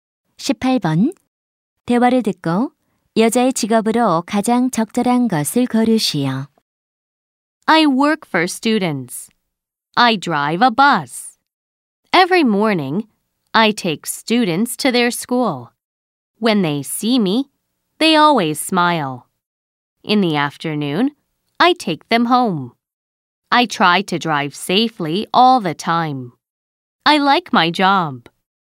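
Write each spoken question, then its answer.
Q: 대화를 듣고 여자의 직업으로 가장 적절한 것을 고르시오.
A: 스쿨버스 운전기사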